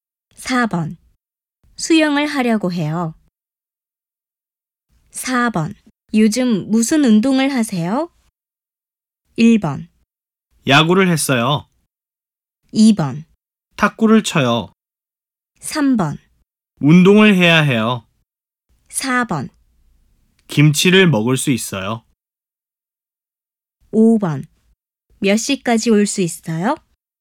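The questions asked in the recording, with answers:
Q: 요즘 무슨 운동을 하세요?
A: 2: 탁구를 쳐요.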